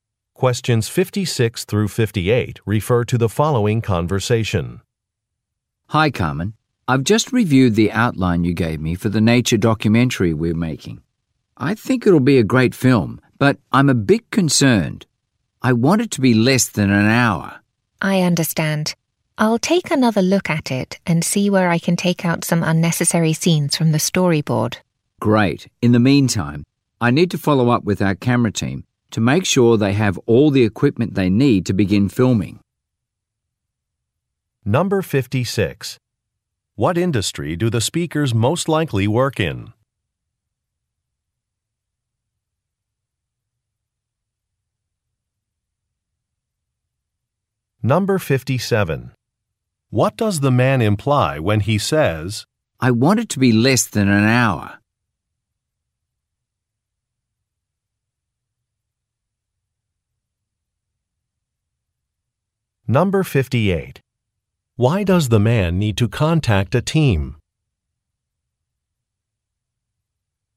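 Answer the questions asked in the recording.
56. Film production
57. The film is too long and should be shortened
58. To make sure they have the equipment for filming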